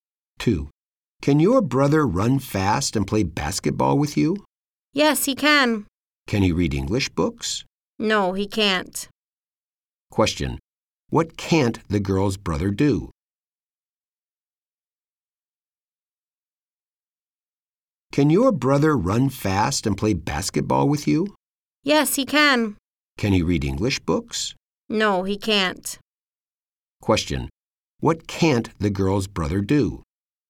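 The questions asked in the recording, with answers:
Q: What can't the girl's brother do?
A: He can't read English books.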